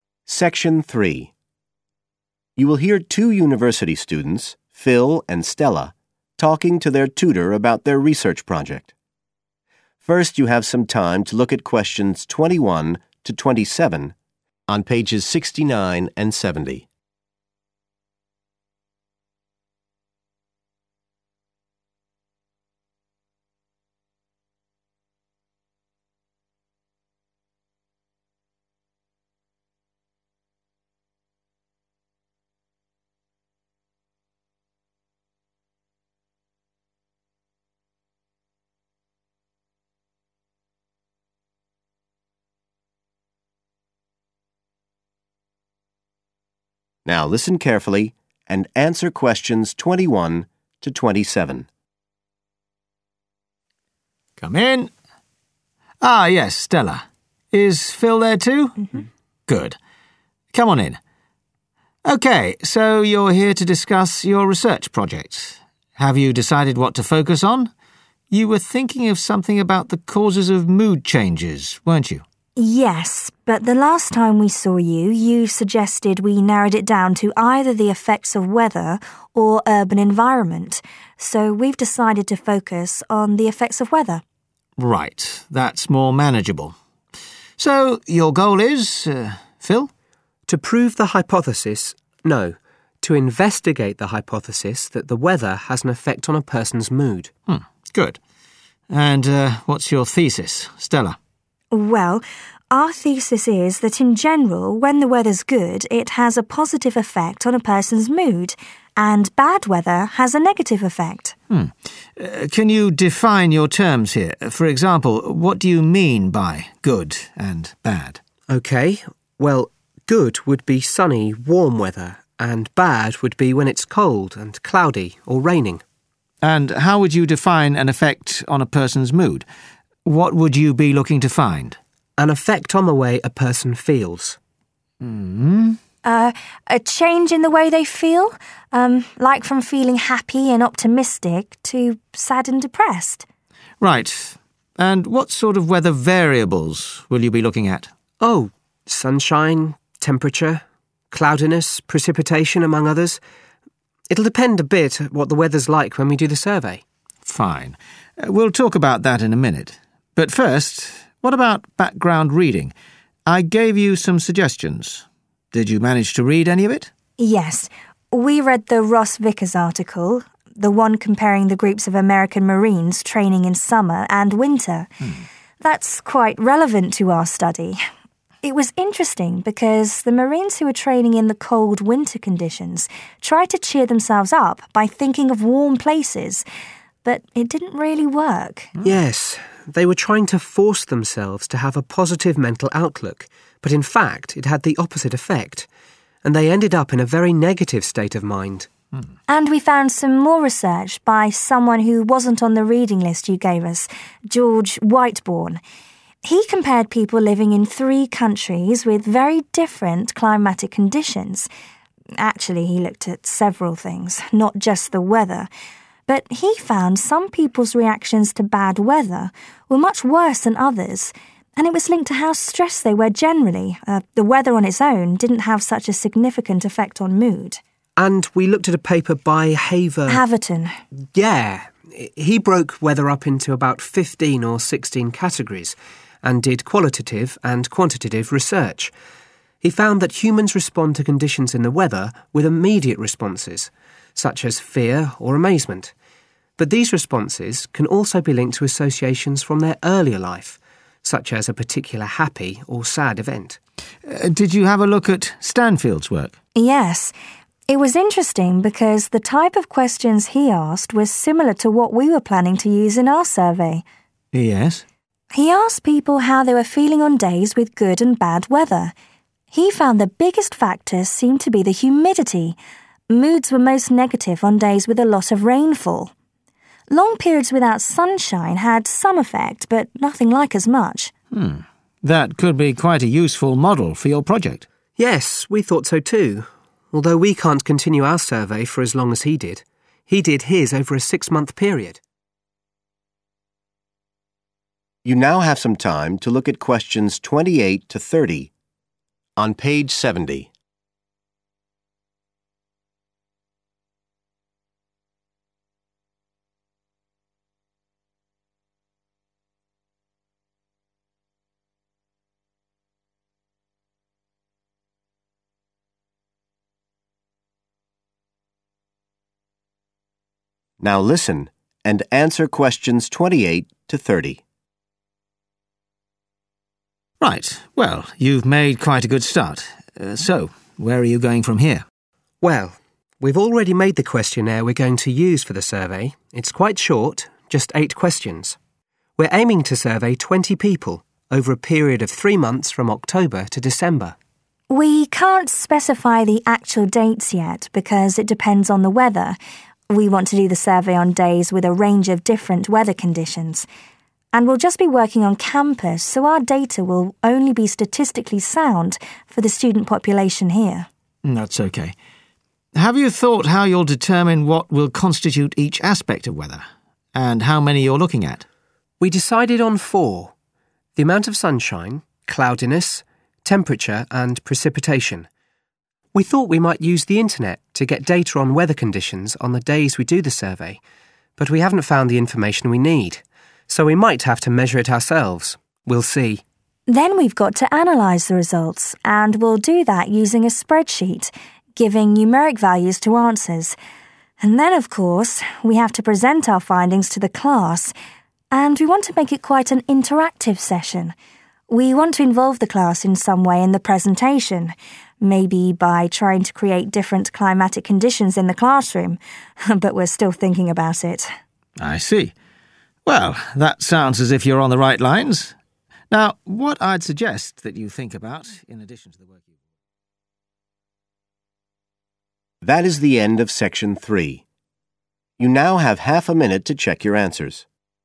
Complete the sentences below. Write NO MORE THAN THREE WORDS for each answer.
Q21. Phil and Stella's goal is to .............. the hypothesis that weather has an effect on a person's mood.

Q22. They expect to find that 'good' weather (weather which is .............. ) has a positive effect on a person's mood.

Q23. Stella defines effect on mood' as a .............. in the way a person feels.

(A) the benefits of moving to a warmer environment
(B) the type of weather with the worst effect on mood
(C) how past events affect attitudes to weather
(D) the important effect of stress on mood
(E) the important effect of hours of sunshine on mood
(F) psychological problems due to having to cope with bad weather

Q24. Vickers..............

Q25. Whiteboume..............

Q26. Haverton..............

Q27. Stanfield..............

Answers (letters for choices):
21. investigate
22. sunny and warm
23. change
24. F
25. D
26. C
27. B